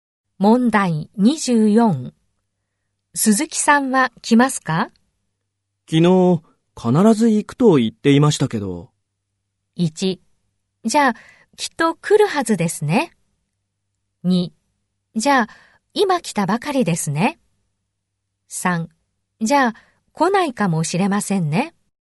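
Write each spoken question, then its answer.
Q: 鈴木さんは来ますか?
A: 1: じゃあきっと来るはずですね。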